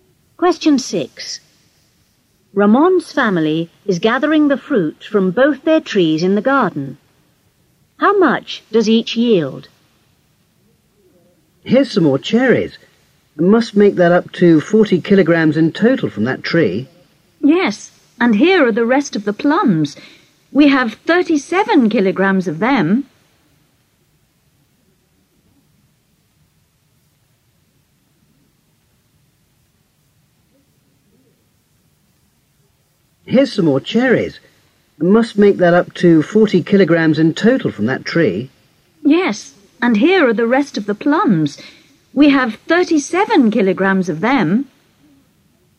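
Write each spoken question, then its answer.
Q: How much does each yield?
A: Cherries 40 kg; plums 37 kg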